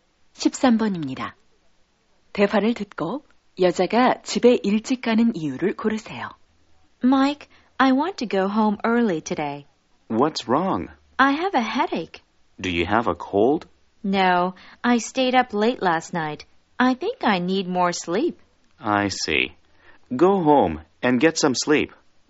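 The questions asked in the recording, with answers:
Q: 대화를 듣고 여자가 집에 일찍 가는 이유를 고르세요.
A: 어젯밤 늦게 자서 머리가 아파서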